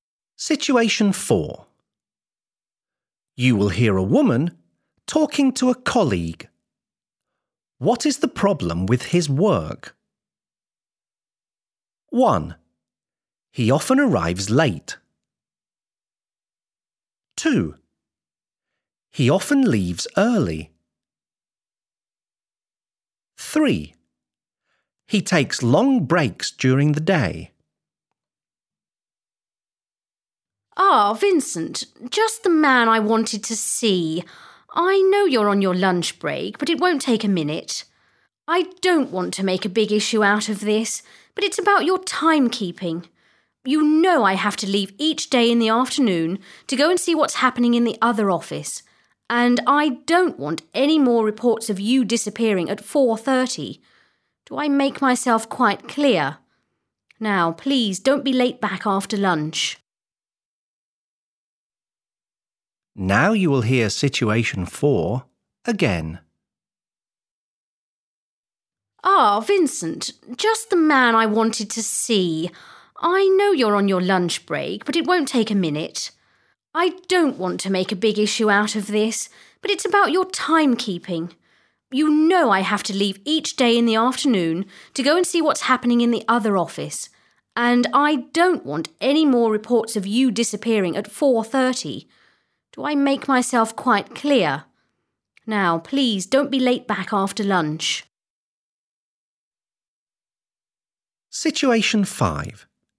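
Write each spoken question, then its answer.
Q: What is the problem with his work?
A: 2: He often leaves early.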